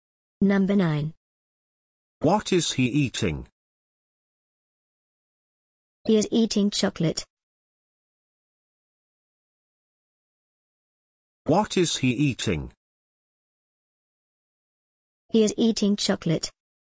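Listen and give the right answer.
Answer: Chocolate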